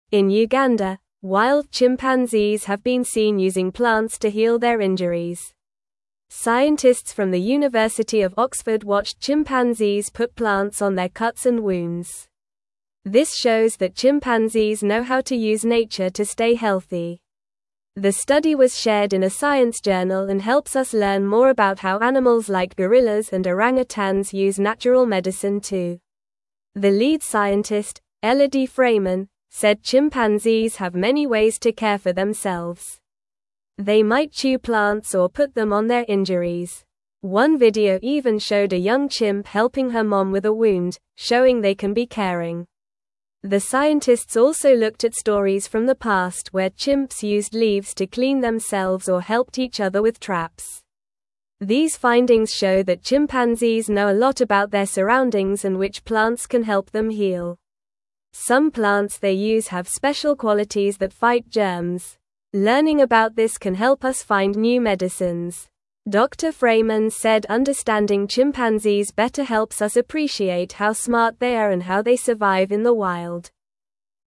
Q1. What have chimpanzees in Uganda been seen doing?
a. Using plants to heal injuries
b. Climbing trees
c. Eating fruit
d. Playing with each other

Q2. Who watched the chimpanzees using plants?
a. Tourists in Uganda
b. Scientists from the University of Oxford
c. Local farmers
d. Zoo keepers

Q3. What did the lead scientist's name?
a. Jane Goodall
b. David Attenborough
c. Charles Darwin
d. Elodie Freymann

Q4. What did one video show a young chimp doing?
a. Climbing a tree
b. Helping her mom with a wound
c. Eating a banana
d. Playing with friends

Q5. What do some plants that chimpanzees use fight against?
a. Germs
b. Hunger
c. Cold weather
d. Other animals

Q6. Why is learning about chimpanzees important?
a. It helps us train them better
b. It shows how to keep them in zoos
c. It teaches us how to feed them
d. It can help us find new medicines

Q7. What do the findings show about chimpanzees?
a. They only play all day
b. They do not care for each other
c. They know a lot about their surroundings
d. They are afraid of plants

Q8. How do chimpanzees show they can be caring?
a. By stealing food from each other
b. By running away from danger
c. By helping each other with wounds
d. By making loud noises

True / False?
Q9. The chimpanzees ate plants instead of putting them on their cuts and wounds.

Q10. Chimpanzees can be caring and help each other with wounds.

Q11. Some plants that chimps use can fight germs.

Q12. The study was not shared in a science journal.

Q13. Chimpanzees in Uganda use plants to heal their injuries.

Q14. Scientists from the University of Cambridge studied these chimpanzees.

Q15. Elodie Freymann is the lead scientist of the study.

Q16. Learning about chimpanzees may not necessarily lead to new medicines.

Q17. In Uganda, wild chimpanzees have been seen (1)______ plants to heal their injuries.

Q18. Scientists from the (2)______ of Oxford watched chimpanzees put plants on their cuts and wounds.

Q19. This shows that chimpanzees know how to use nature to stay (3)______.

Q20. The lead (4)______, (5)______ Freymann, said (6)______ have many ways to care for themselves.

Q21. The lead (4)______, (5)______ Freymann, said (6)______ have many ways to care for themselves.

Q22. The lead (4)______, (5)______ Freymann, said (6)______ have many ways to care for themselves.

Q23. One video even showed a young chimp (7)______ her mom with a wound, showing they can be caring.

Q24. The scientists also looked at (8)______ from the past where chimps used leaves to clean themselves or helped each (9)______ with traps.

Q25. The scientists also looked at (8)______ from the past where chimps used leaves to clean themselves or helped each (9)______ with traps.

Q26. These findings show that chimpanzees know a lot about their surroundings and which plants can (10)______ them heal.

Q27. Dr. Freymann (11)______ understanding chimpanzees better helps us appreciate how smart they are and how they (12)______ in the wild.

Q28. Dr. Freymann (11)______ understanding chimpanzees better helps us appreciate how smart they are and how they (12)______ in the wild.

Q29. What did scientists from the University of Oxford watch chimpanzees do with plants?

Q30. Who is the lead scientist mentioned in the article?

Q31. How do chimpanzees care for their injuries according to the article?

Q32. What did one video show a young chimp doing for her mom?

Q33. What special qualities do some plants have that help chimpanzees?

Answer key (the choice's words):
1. Using plants to heal injuries
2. Scientists from the University of Oxford
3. Elodie Freymann
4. Helping her mom with a wound
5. Germs
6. It can help us find new medicines
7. They know a lot about their surroundings
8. By helping each other with wounds
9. False
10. True
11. True
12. False
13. True
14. False
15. True
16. False
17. using
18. University
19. healthy
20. scientist
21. Elodie
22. chimpanzees
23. helping
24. stories
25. other
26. help
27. said
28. survive
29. The scientists watched chimpanzees put plants on their cuts and wounds.
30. The lead scientist is Elodie Freymann.
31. Chimpanzees care for their injuries by chewing plants or putting them on their wounds.
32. The video showed a young chimp helping her mom with a wound.
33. Some plants can fight germs and help chimpanzees heal.

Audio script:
In Uganda, wild chimpanzees have been seen using plants to heal their injuries. Scientists from the University of Oxford watched chimpanzees put plants on their cuts and wounds. This shows that chimpanzees know how to use nature to stay healthy. The study was shared in a science journal and helps us learn more about how animals like gorillas and orangutans use natural medicine too.
The lead scientist, Elodie Freymann, said chimpanzees have many ways to care for themselves. They might chew plants or put them on their injuries. One video even showed a young chimp helping her mom with a wound, showing they can be caring. The scientists also looked at stories from the past where chimps used leaves to clean themselves or helped each other with traps.
These findings show that chimpanzees know a lot about their surroundings and which plants can help them heal. Some plants they use have special qualities that fight germs. Learning about this can help us find new medicines. Dr. Freymann said understanding chimpanzees better helps us appreciate how smart they are and how they survive in the wild.

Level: Level 2